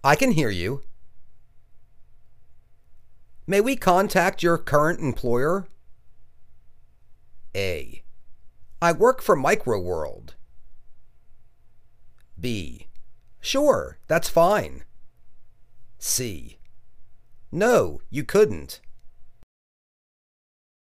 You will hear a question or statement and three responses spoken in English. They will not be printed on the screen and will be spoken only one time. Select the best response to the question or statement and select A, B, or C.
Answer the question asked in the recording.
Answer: Sure, that's fine.